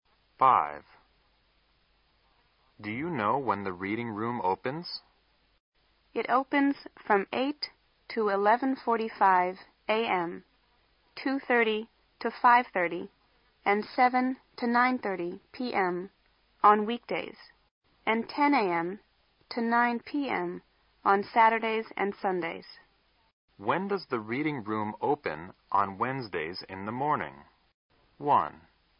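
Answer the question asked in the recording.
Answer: From 8 to 11:45 a.m.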